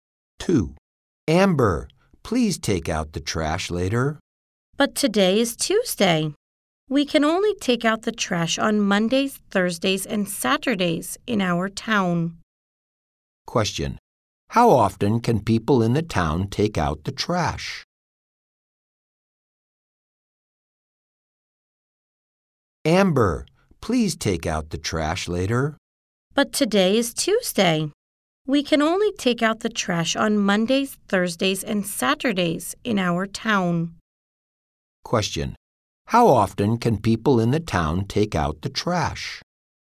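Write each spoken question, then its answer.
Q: How often can people in the town take out the trash?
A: Three times a week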